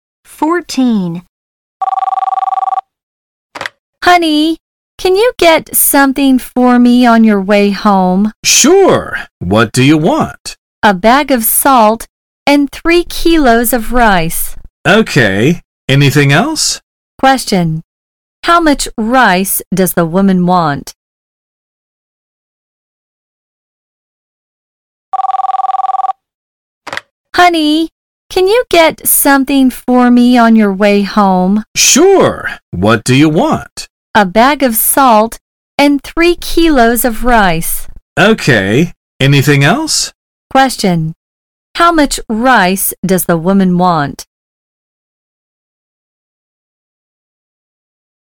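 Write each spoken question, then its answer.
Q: How much rice does the woman want?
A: Three kilos.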